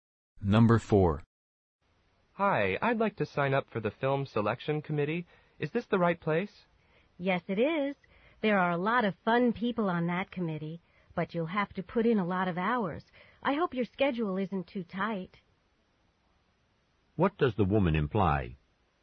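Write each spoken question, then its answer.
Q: What does the woman imply?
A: Being on the committee will take a lot of time.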